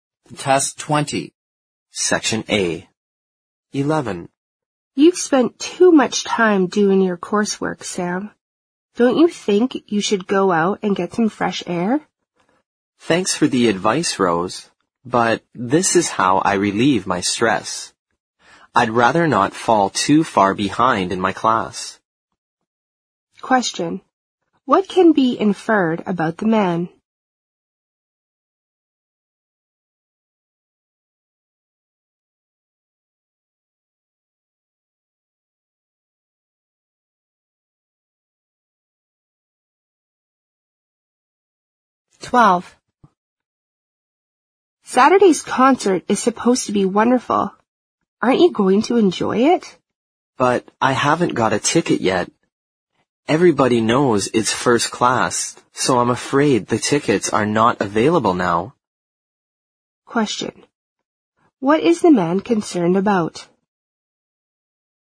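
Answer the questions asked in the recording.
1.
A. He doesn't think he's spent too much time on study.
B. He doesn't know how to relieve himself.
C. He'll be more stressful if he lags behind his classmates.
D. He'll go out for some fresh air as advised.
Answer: C. He'll be more stressful if he lags behind his classmates.
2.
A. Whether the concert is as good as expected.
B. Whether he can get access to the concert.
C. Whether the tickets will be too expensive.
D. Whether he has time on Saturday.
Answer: B. Whether he can get access to the concert.

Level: 四级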